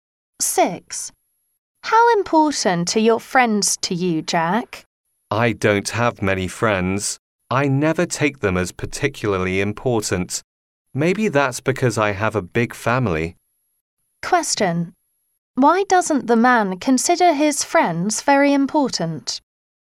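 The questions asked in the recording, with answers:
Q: Why doesn't the man consider his friends very important?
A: Because he has a big family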